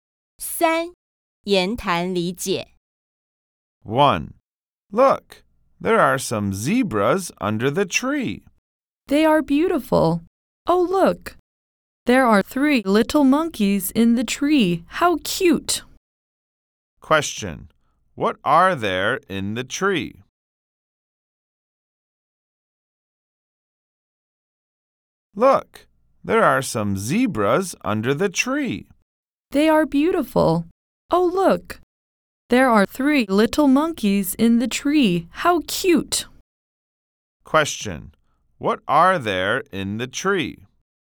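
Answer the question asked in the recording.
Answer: Three little monkeys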